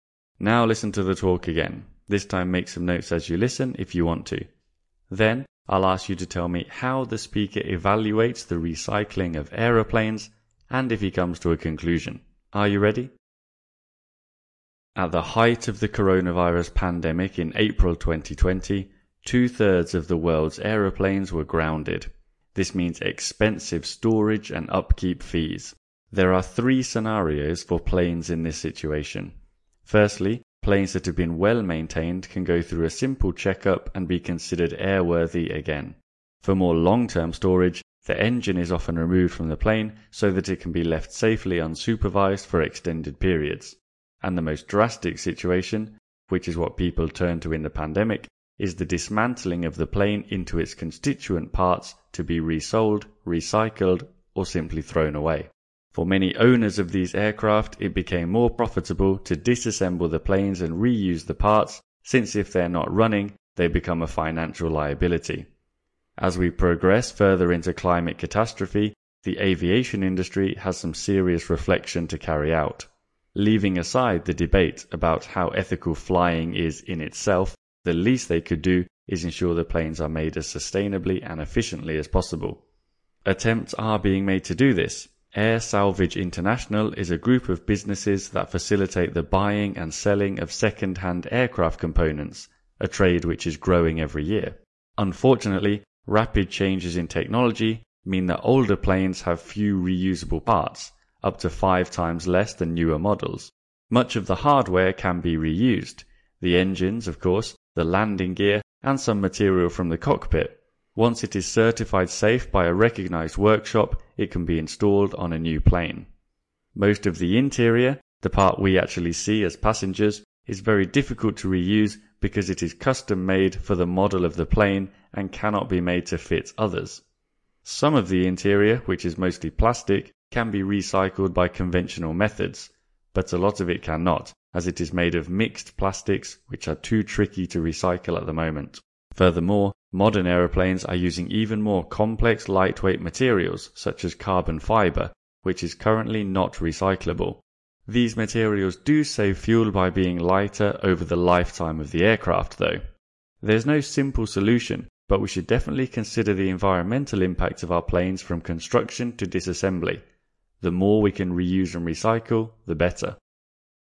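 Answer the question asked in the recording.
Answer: He says it is hard: older planes have few reusable parts, and mixed plastics and carbon fibre can't be recycled, though engines, landing gear and some cockpit parts can be reused. His conclusion is that there is no simple solution, but we should consider planes' environmental impact from construction to disassembly, and the more we reuse and recycle, the better.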